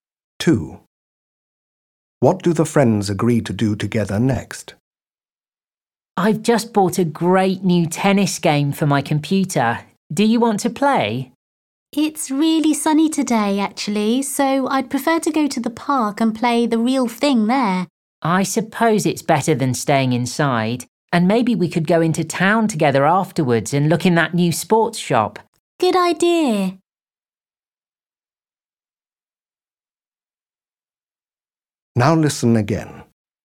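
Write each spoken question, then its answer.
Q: What do the friends agree to do together next?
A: Play tennis in the park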